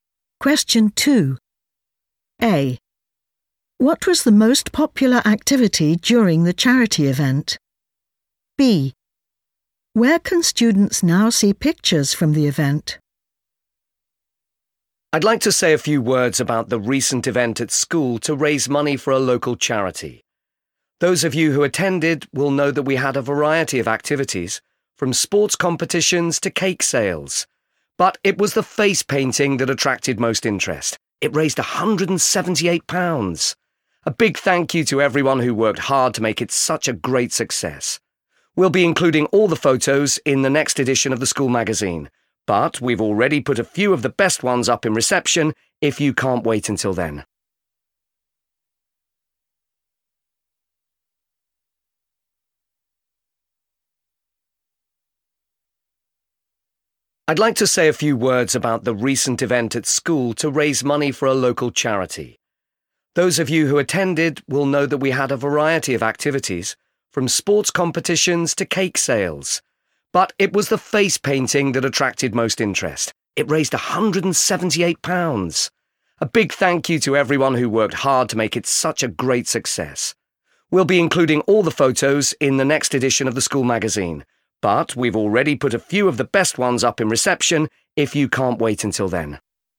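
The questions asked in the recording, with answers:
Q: What was the most popular activity during the charity event?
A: face painting

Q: Where can students now see pictures from the event?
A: in reception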